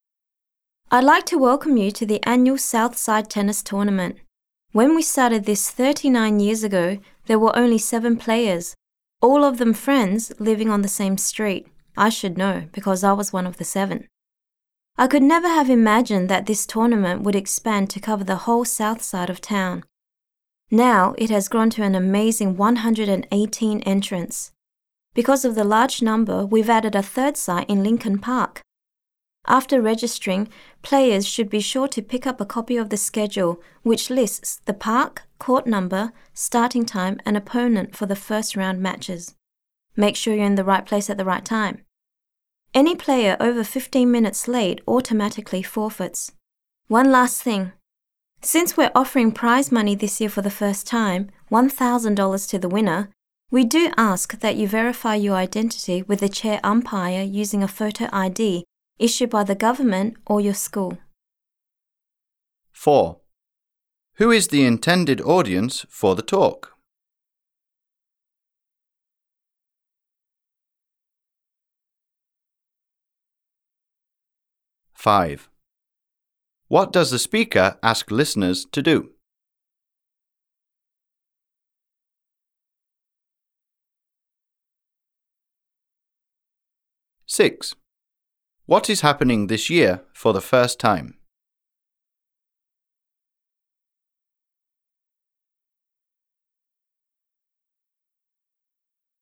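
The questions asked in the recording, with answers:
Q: Who is the intended audience for the talk?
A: Tennis players entered in the tournament

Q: What is happening this year for the first time?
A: Prize money is being offered ($1,000 to the winner)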